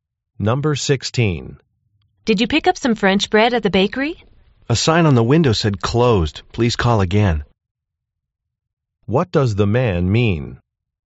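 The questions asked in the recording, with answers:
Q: What does the man mean?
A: The bakery was closed.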